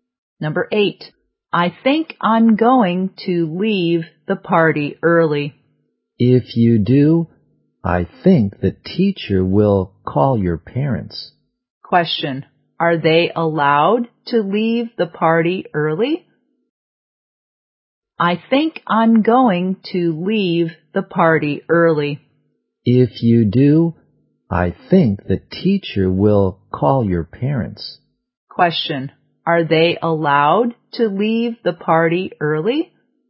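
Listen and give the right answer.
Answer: No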